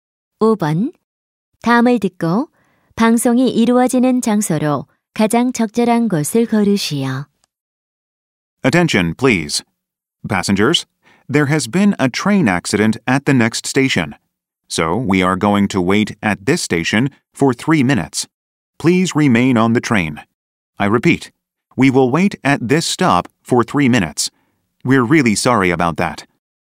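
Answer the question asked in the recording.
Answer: 기차 안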